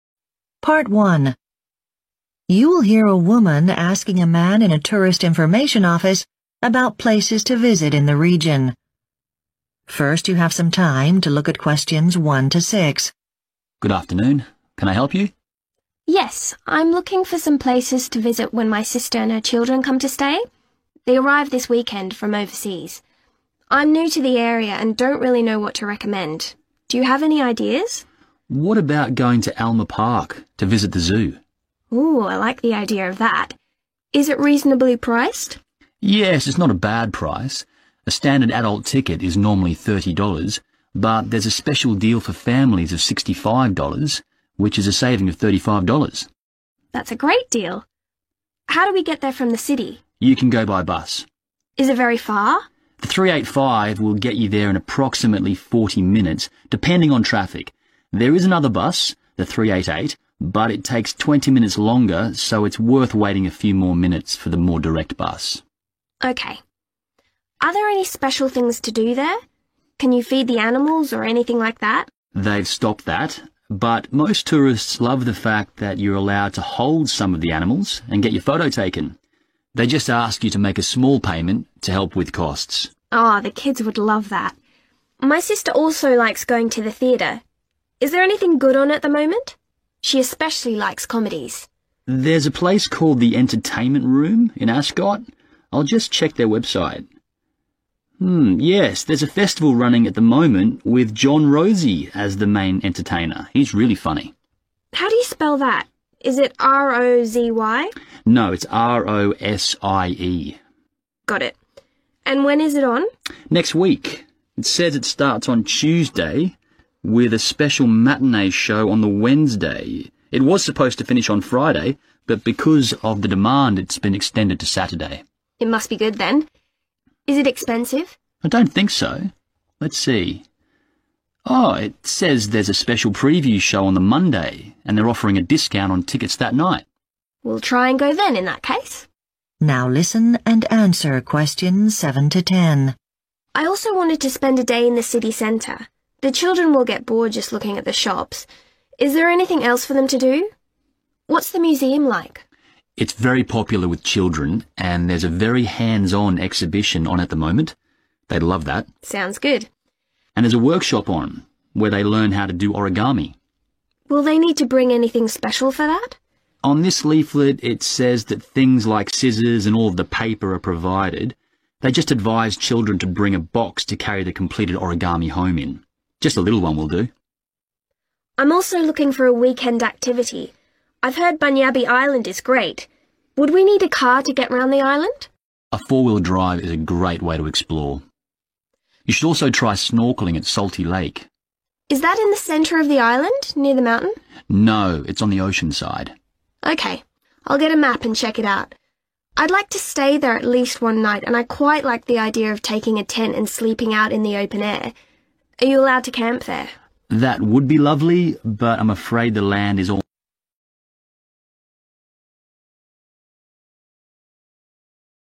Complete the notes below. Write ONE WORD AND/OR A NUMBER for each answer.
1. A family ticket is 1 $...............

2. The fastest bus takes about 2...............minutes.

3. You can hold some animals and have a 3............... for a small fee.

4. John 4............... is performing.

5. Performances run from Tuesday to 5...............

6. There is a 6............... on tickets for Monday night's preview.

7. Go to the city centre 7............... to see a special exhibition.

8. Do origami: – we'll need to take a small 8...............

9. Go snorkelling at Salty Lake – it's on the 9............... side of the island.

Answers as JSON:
{"1": "65", "2": "40", "3": "photo", "4": "Rosie", "5": "Saturday", "6": "discount", "7": "museum", "8": "box", "9": "ocean"}